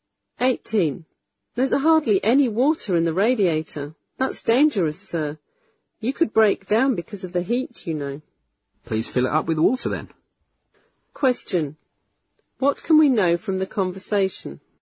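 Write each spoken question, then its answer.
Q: What can we know from the conversation?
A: The car's radiator needs water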